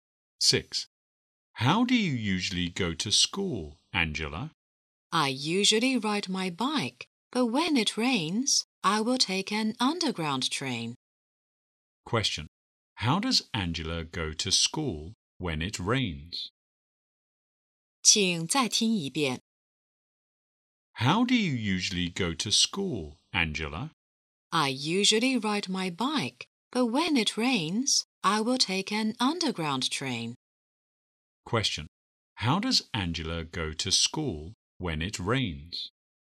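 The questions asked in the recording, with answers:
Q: How does Angela go to school when it rains?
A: By underground train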